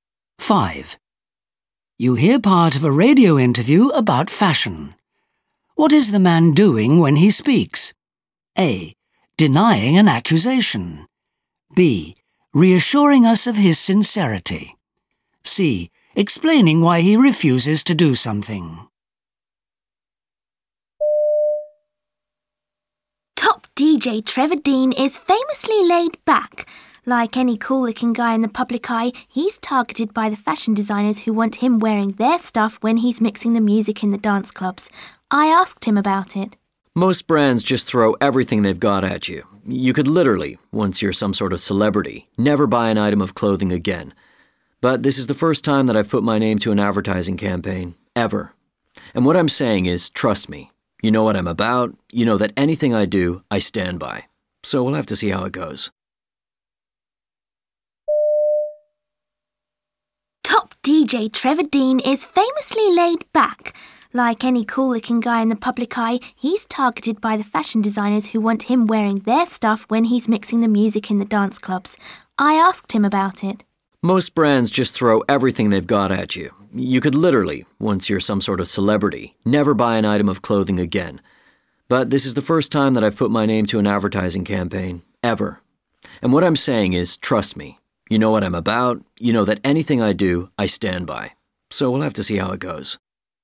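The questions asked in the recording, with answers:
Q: What is the man doing when he speaks?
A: B: Reassuring us of his sincerity.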